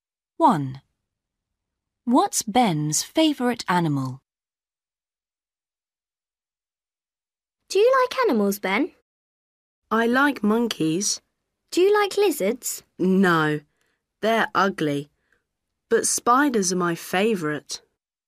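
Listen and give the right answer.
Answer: spiders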